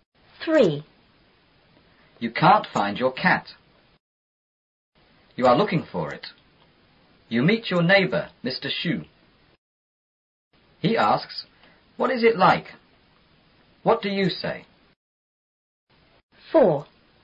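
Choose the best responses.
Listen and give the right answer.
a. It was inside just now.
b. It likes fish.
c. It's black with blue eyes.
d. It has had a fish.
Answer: c. It's black with blue eyes.

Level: 初中英语广州版4B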